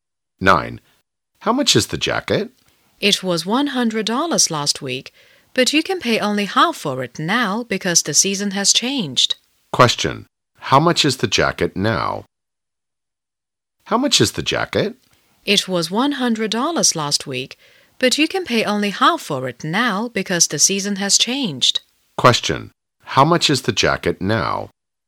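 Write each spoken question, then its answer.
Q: How much is the jacket now?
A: $50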